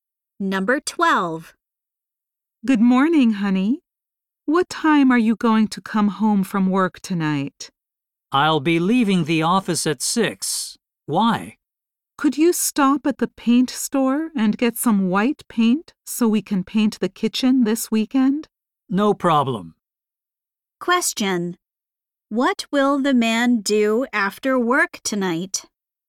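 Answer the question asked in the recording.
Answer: Go to the paint store and buy white paint.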